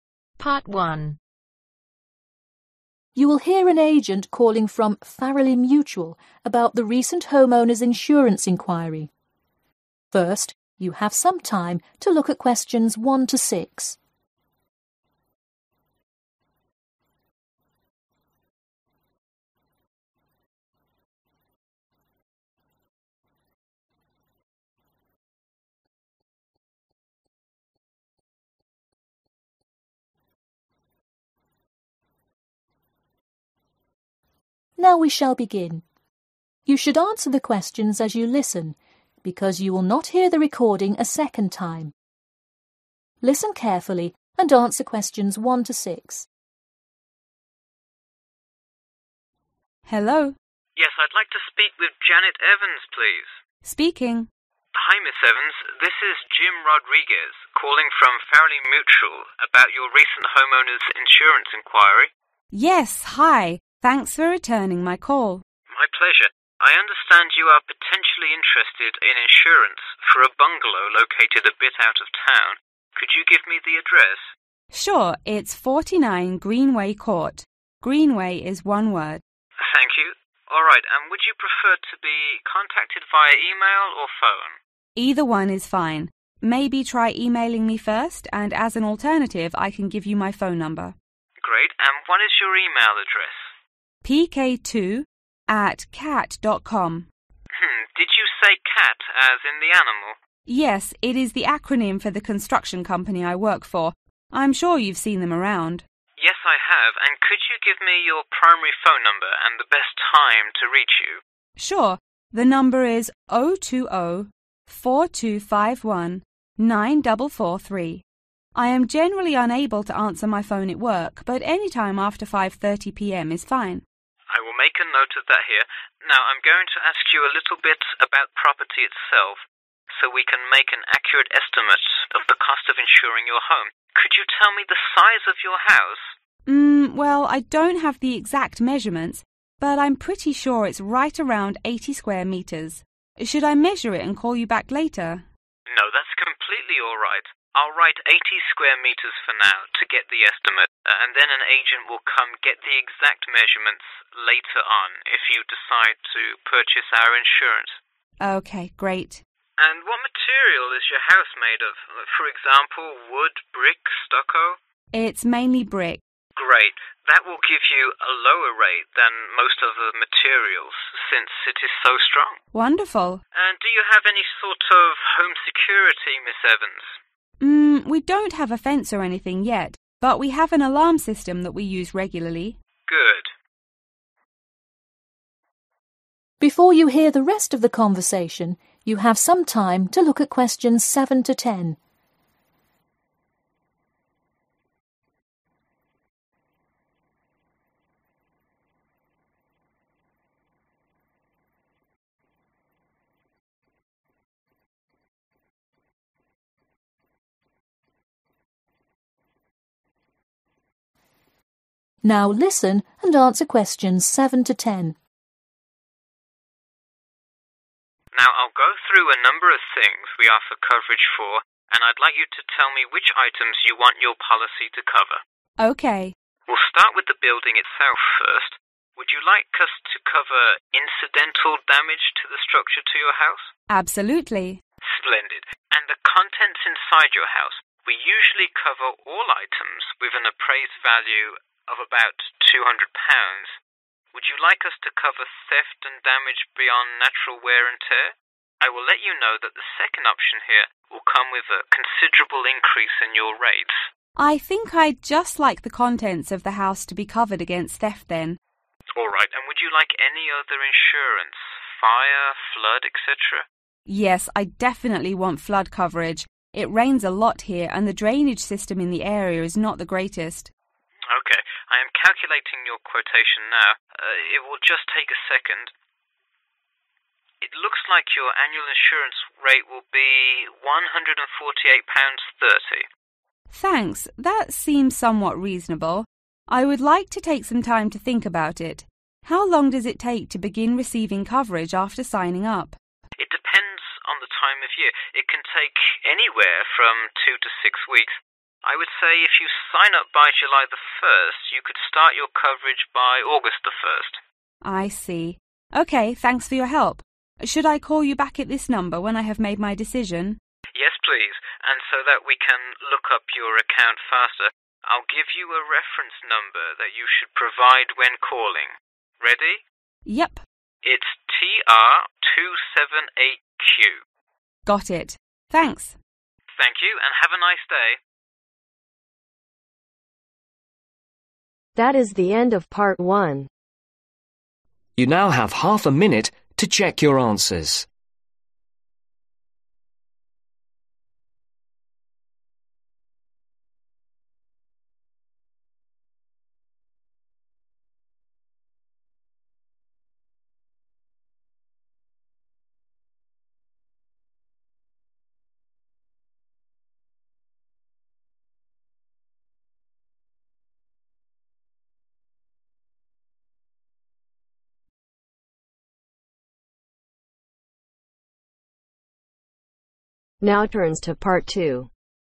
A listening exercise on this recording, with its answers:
Complete the form below. Write NO MORE THAN TWO WORDS AND/OR A NUMBER for each answer.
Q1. Address: 49 (1)............ Court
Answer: Greenway

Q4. Property size: (4)............ m2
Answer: 80

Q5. Material (s): (5)............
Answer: Brick

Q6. Security measures(if any): (6)............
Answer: Alarm system

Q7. Items to cover: building, contents, (7)............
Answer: Flood

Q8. Quotation: (8)£............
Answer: 148.30

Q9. Coverage start date: (9)............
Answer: 1 August/August 1(st)

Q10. Reference number: (10)...........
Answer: TR278Q